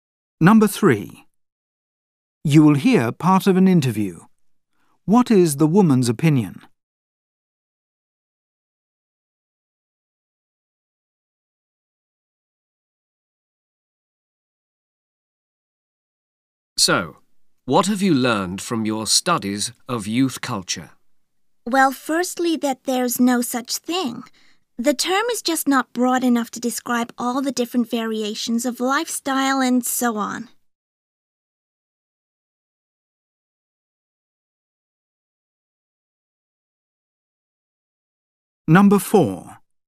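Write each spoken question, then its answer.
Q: What is the woman's opinion?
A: There is no single youth culture; the term is too narrow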